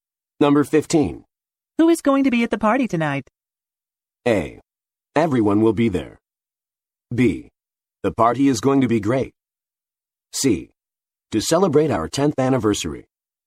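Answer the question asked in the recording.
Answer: A: Everyone will be there.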